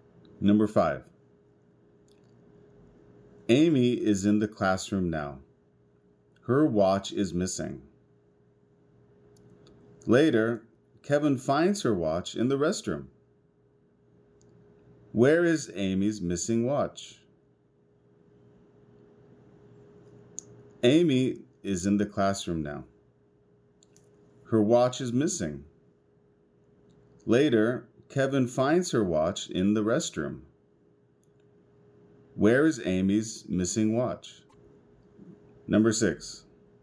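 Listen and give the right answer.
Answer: In the restroom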